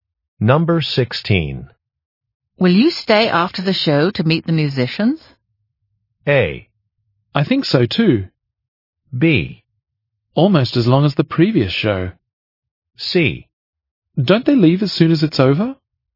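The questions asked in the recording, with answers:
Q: Will you stay after the show to meet the musicians?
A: C: Don't they leave as soon as it's over?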